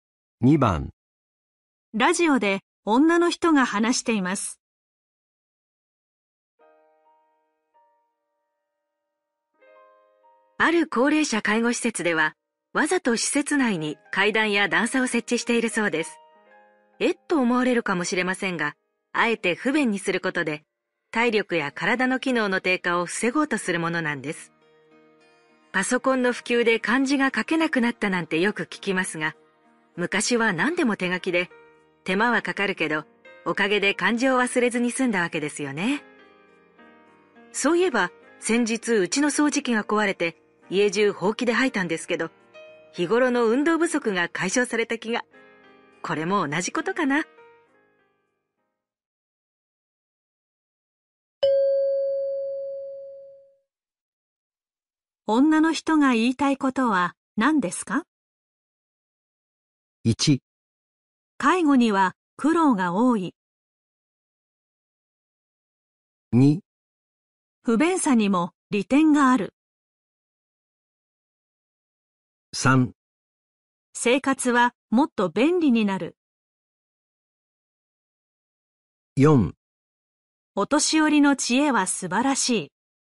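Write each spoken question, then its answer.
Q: 女の人が言いたいことは何ですか?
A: 2: 不便さにも利点がある。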